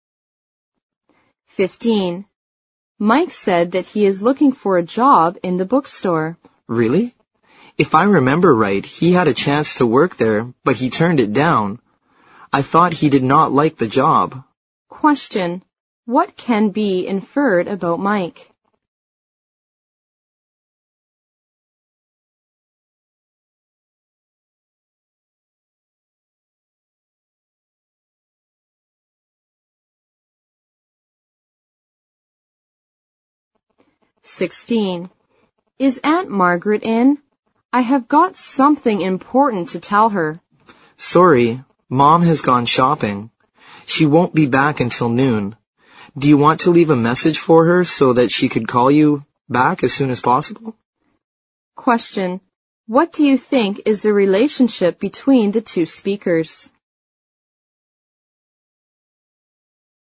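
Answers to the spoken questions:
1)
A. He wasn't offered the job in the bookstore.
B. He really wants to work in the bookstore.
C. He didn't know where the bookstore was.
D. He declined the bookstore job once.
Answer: D. He declined the bookstore job once.
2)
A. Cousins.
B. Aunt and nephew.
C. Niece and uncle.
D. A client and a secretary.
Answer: A. Cousins.

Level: 六级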